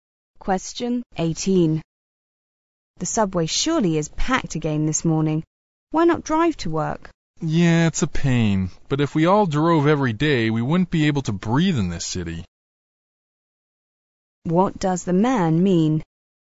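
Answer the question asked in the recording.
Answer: If everyone drove, the air pollution would be terrible, so he takes the subway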